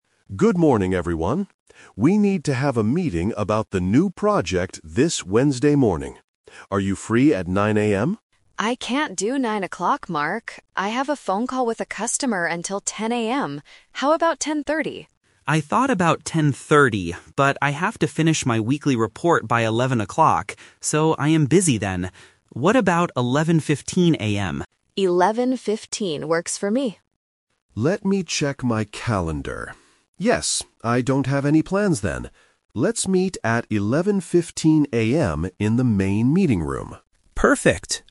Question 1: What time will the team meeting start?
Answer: 11:15 AM

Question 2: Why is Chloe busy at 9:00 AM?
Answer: She is talking to a customer.

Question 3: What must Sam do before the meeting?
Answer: Finish a weekly report.